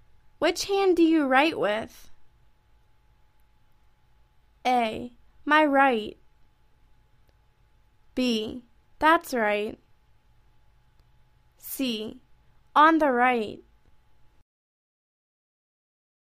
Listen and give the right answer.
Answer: My right.